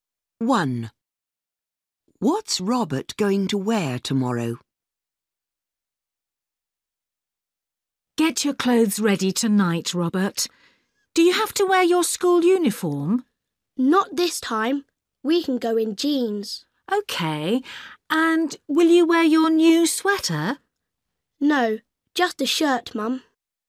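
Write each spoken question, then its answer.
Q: What's Robert going to wear tomorrow?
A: Jeans and a shirt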